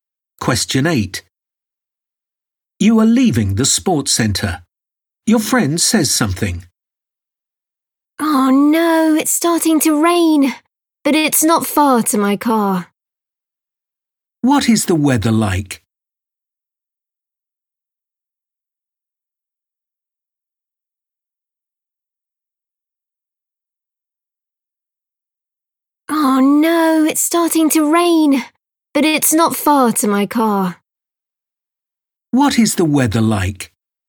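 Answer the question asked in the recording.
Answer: it's starting to rain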